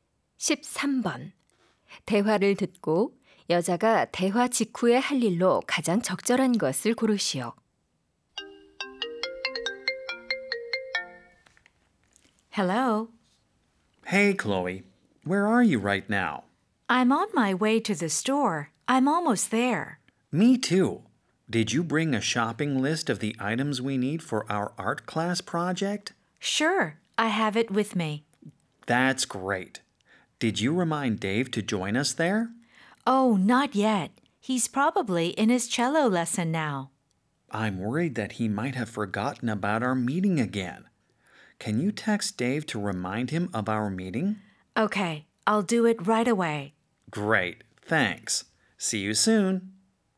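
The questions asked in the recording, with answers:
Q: 대화를 듣고 여자가 대화 직후에 할 일로 가장 적절한 것을 고르시오.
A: Dave에게 만남을 상기시키는 문자 보내기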